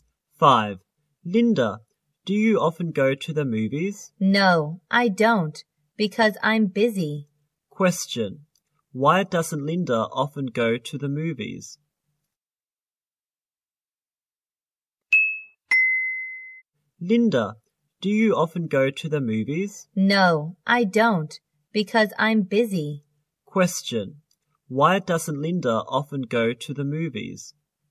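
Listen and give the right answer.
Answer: Because she's busy.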